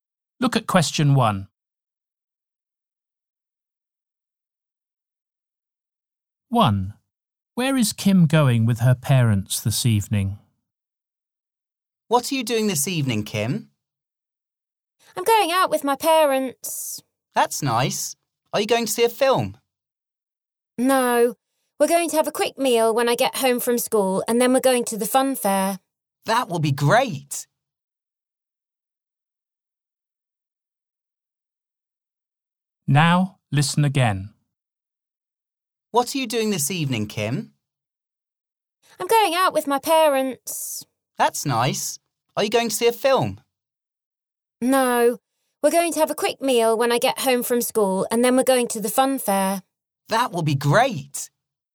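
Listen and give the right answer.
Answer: To the fun fair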